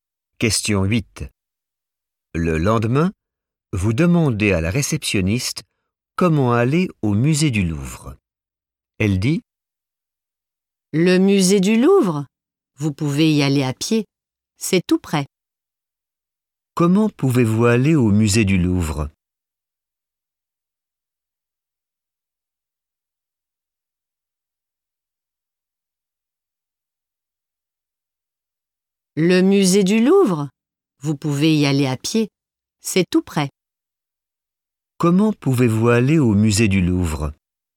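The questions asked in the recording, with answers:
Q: Comment pouvez-vous aller au musée du Louvre?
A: à pied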